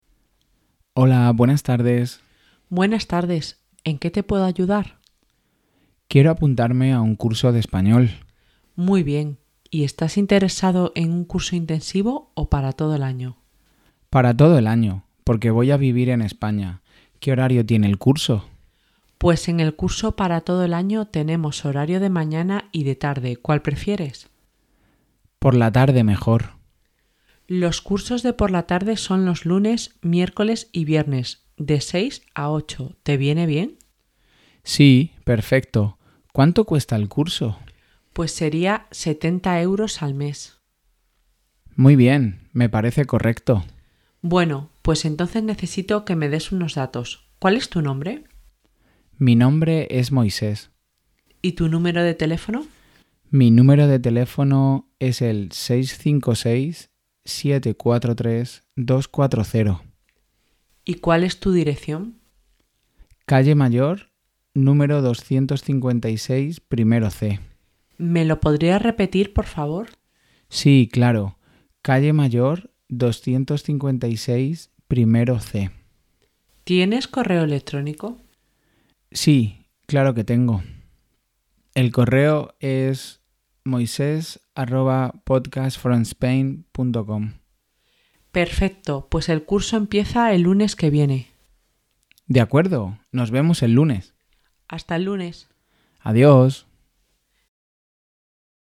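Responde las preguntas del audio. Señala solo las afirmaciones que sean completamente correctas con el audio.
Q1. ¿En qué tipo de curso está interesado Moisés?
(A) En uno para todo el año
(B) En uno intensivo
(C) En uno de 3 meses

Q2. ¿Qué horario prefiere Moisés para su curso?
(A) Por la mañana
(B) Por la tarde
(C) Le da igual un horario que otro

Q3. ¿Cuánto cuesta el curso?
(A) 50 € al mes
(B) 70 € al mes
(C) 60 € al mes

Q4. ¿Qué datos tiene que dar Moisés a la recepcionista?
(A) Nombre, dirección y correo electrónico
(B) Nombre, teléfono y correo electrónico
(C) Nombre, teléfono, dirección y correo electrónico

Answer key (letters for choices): 1A, 2B, 3B, 4C

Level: Nivel sugerido: A1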